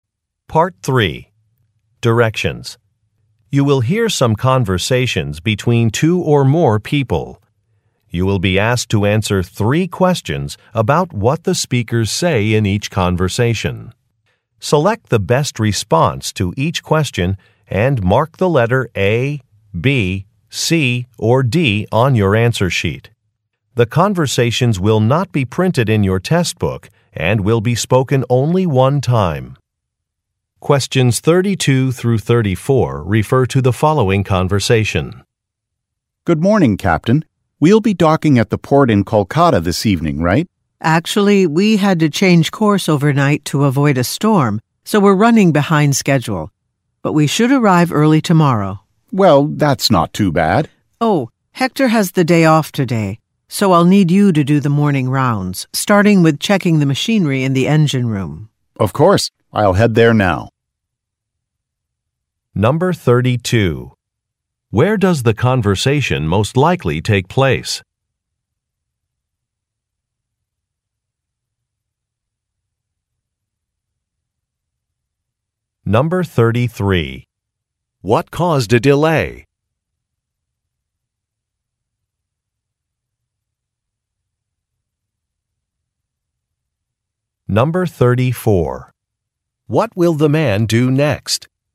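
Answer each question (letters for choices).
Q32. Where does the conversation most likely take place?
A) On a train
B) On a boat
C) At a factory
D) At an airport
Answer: B

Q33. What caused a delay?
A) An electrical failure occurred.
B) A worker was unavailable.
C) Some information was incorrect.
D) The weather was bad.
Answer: D

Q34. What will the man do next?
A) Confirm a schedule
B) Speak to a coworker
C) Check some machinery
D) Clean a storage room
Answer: C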